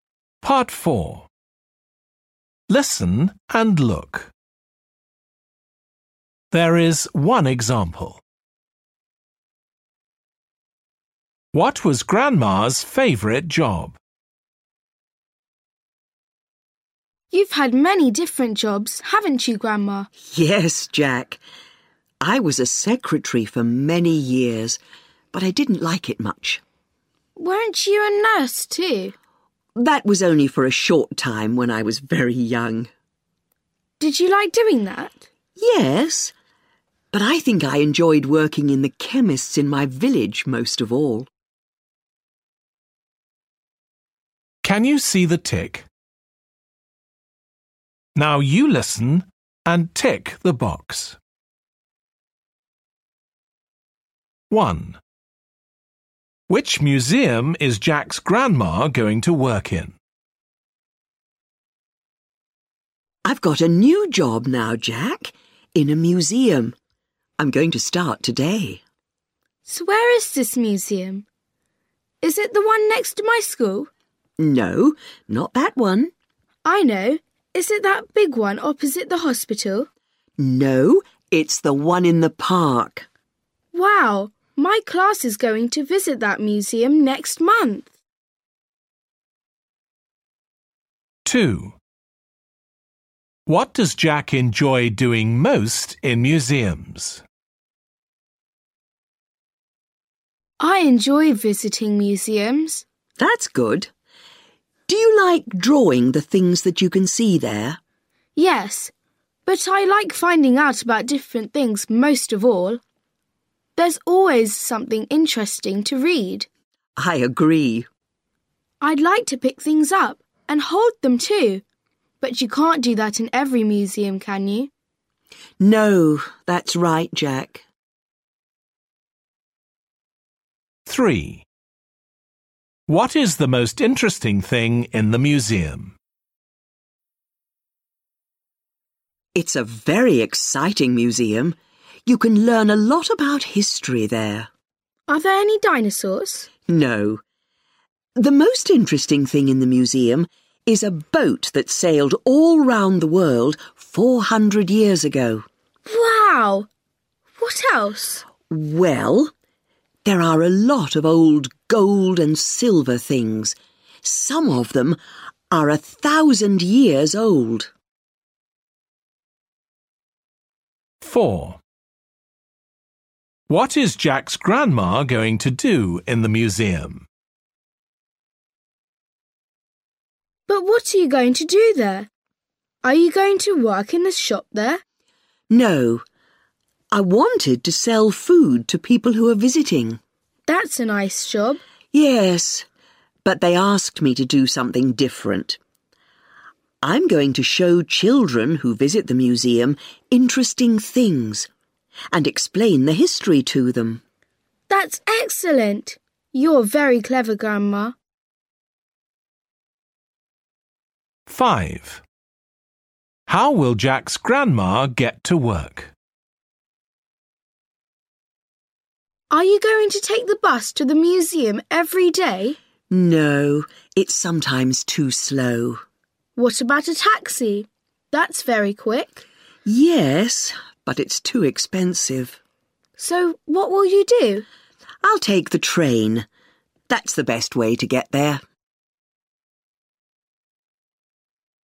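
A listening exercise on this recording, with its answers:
Listen and choose the right answer .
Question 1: Which museum is Jack's grandma going to work in?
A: the one in the park

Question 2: What does Jack enjoy doing most in museums?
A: finding out about different things (reading)

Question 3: What is the most interesting thing in the museum?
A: a boat that sailed round the world

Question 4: What is Jack's grandma going to do in the museum?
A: show children interesting things and explain the history

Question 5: How will Jack's grandma get to work?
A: by train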